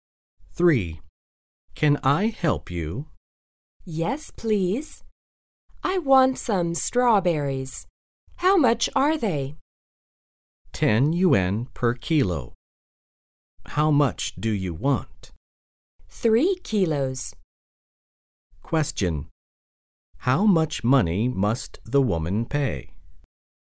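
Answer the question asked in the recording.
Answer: 30 yuan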